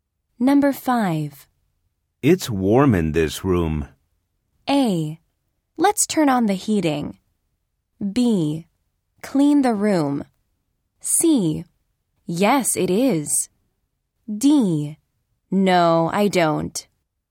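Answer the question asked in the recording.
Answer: C: Yes, it is.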